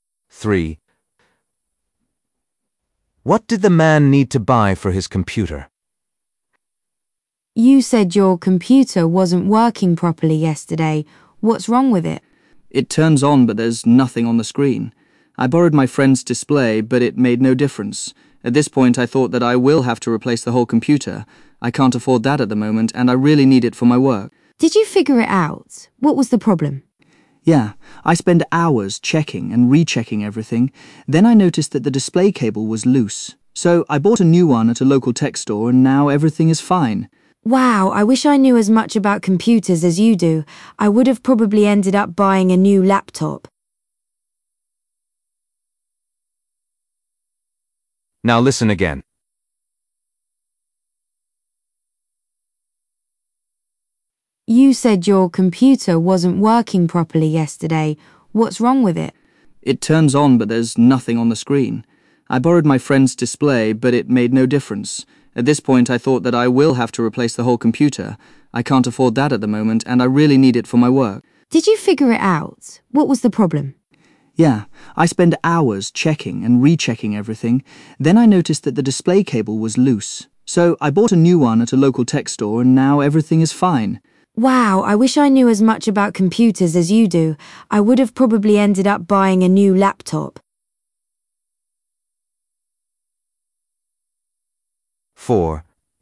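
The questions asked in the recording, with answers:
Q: What did the man need to buy for his computer?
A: a display cable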